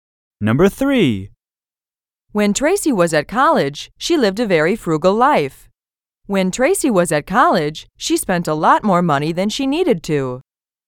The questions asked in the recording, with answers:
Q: When Tracy was at college, she spent a lot more money than she needed to.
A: Different is the correct answer.